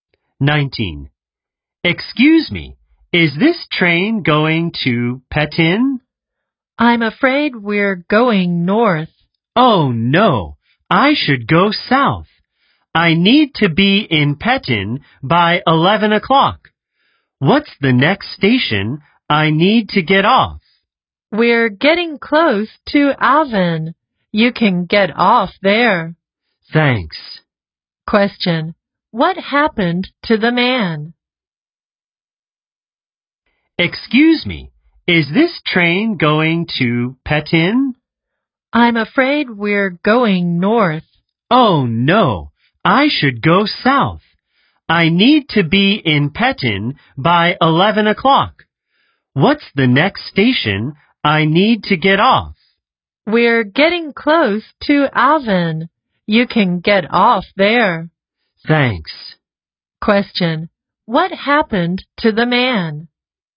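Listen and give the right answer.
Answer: He took the wrong train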